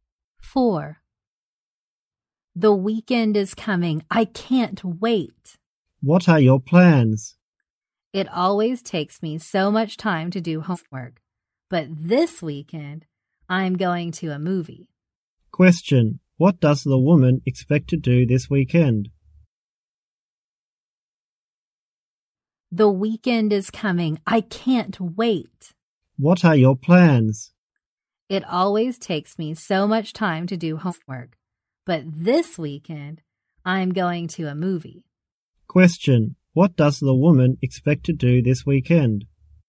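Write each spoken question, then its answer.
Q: What does the woman expect to do this weekend?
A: Go to a movie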